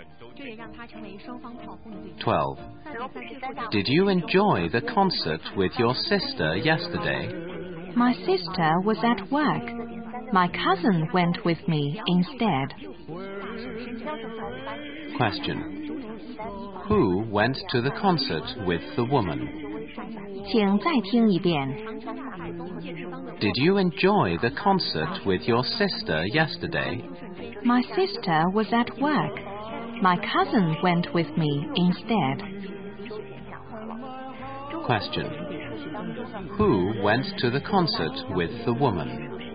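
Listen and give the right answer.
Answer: Her cousin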